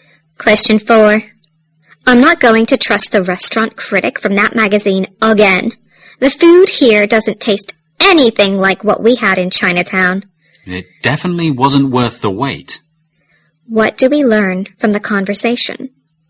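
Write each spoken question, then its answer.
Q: What do we learn from the conversation?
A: The speakers are disappointed with the restaurant, which the magazine critic had recommended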